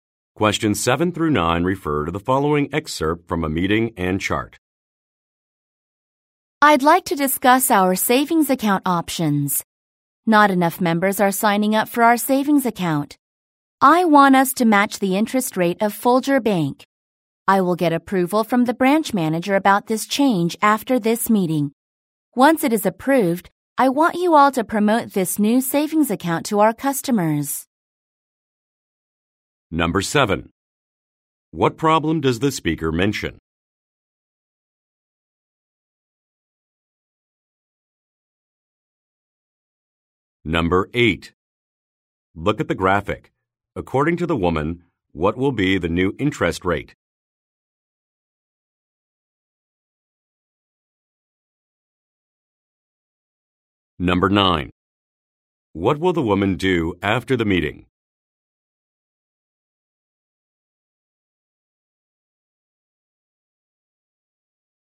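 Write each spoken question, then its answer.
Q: What problem does the speaker mention?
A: Not enough members are signing up for the savings account

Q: What will the woman do after the meeting?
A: Get approval from the branch manager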